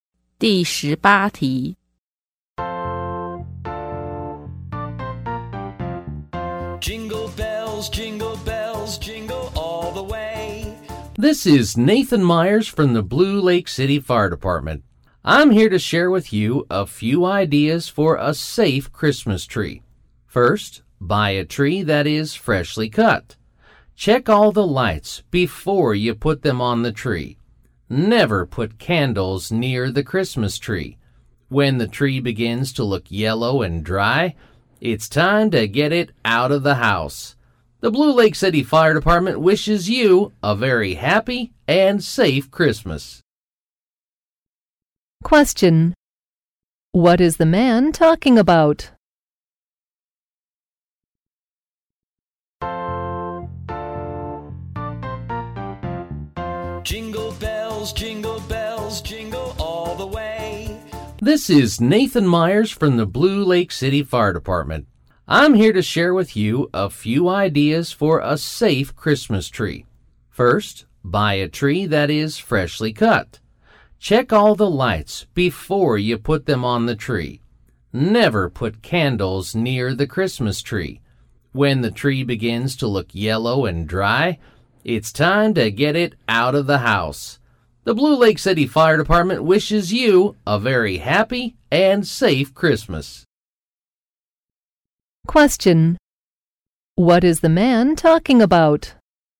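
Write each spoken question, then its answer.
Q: What is the man talking about?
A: Christmas tree safety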